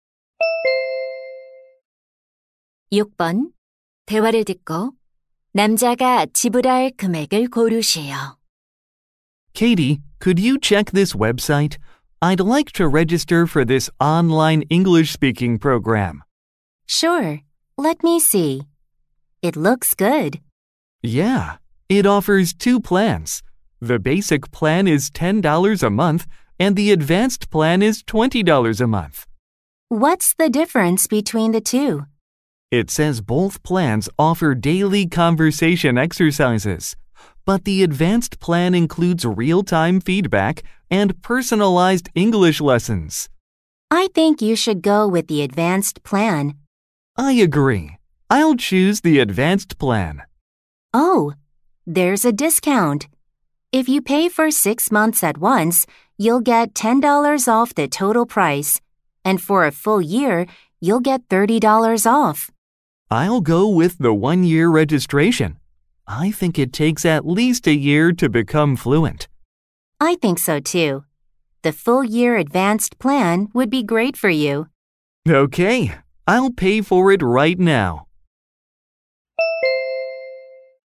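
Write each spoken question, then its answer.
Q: 대화를 듣고 남자가 지불할 금액을 고르시오.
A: $210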